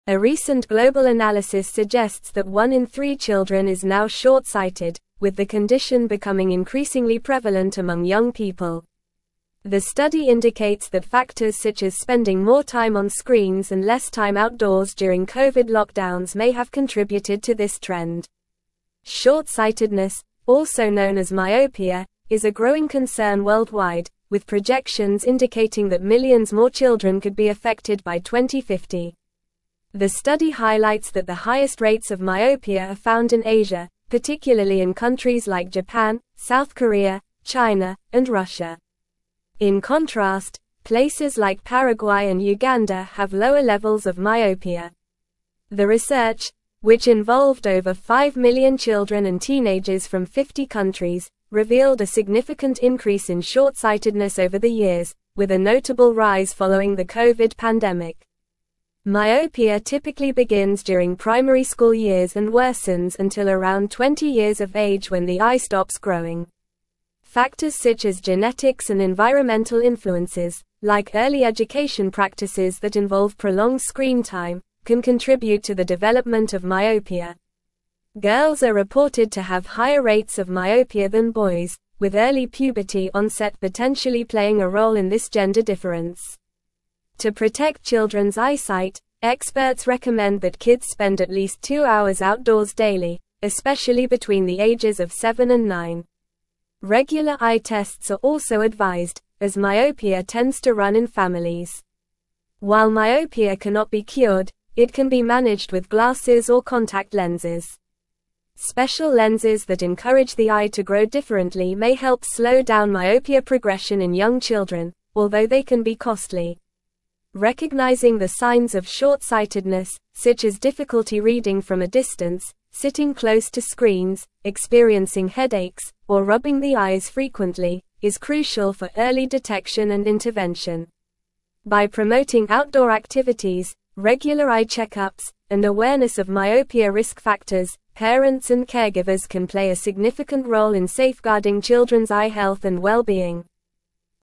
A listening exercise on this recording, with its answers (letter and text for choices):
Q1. What is another term for short-sightedness?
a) Hyperopia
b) Astigmatism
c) Myopia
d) Presbyopia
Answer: c) Myopia

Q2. According to the article, which factor may have contributed to the increasing prevalence of myopia among young people?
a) Spending more time outdoors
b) Eating more carrots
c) Spending more time on screens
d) Reading more books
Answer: c) Spending more time on screens

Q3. In which region are the highest rates of myopia found, according to the study?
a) Europe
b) Asia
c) Africa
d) North America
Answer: b) Asia

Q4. At what age does myopia typically worsen until the eye stops growing?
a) Around 30 years old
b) Around 15 years old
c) Around 25 years old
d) Around 20 years old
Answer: d) Around 20 years old

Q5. What is one of the recommended ways to manage myopia in young children?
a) Increasing screen time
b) Spending at least two hours outdoors daily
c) Avoiding regular eye tests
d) Ignoring signs of short-sightedness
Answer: b) Spending at least two hours outdoors daily

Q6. What is a potential environmental influence on the development of myopia mentioned in the article?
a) Early education practices involving prolonged screen time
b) Spending more time outdoors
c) Genetics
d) Consuming more vegetables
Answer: a) Early education practices involving prolonged screen time

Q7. What is a common sign of short-sightedness mentioned in the article?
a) Sitting close to screens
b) Spending more time outdoors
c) Eating more carrots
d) Experiencing fewer headaches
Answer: a) Sitting close to screens

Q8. How can parents and caregivers play a significant role in safeguarding children's eye health?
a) Encouraging more screen time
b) Ignoring signs of myopia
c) Avoiding early detection and intervention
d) Promoting outdoor activities and regular eye check-ups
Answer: d) Promoting outdoor activities and regular eye check-ups

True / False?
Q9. Paraguay and Uganda have lower levels of myopia compared to other countries.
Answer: True

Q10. Factors like increased screen time and decreased outdoor activities during Covid lockdowns may have contributed to the rise in myopia among young people.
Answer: True

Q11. Girls are reported to have higher rates of myopia than boys, potentially due to early puberty onset.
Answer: True

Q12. Hyperopia typically starts during primary school years and improves until around 20 years of age.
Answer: False

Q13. Experts recommend that children spend at least two hours indoors daily to protect their eyesight and reduce the risk of hyperopia.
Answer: False

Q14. The study found that the highest rates of myopia are in countries like Japan, South Korea, China, and Russia.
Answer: True

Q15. One in five children globally is now long-sighted, according to a recent analysis.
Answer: False

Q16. Hyperopia, also known as long-sightedness, is a decreasing concern worldwide.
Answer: False

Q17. A recent (1)______ analysis suggests that one in three children is now short-sighted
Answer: global

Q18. with the (2)______ becoming increasingly prevalent among young people.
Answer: condition

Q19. may have contributed to this (3)______.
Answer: trend

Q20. Short-sightedness, also known as myopia, is a growing (4)______ worldwide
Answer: concern

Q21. particularly in countries like Japan, South Korea, China, and (5)______.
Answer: Russia

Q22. with a notable rise following the Covid (6)______.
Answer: pandemic

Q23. Myopia typically begins during primary (7)______ years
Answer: school

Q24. Factors such as genetics and environmental (8)______,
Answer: influences

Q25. like early education practices that involve prolonged (9)______ time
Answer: screen

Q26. with early puberty onset potentially (10)______ a role in this gender difference.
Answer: playing

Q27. To (11)______ children's eyesight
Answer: protect

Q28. (12)______ eye tests are also advised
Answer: Regular

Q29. may help slow down myopia progression in young (13)______,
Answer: children

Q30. such as difficulty reading from a (14)______,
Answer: distance

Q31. (15)______ and caregivers can play a (16)______ role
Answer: parents

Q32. can play a (16)______ role in safeguarding children's eye health and well-being.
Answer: significant

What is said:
A recent global analysis suggests that one in three children is now short-sighted, with the condition becoming increasingly prevalent among young people. The study indicates that factors such as spending more time on screens and less time outdoors during Covid lockdowns may have contributed to this trend. Short-sightedness, also known as myopia, is a growing concern worldwide, with projections indicating that millions more children could be affected by 2050.
The study highlights that the highest rates of myopia are found in Asia, particularly in countries like Japan, South Korea, China, and Russia. In contrast, places like Paraguay and Uganda have lower levels of myopia. The research, which involved over five million children and teenagers from 50 countries, revealed a significant increase in short-sightedness over the years, with a notable rise following the Covid pandemic.
Myopia typically begins during primary school years and worsens until around 20 years of age when the eye stops growing. Factors such as genetics and environmental influences, like early education practices that involve prolonged screen time, can contribute to the development of myopia. Girls are reported to have higher rates of myopia than boys, with early puberty onset potentially playing a role in this gender difference.
To protect children's eyesight, experts recommend that kids spend at least two hours outdoors daily, especially between the ages of seven and nine. Regular eye tests are also advised, as myopia tends to run in families. While myopia cannot be cured, it can be managed with glasses or contact lenses. Special lenses that encourage the eye to grow differently may help slow down myopia progression in young children, although they can be costly.
Recognizing the signs of short-sightedness, such as difficulty reading from a distance, sitting close to screens, experiencing headaches, or rubbing the eyes frequently, is crucial for early detection and intervention. By promoting outdoor activities, regular eye check-ups, and awareness of myopia risk factors, parents and caregivers can play a significant role in safeguarding children's eye health and well-being.

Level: Level 4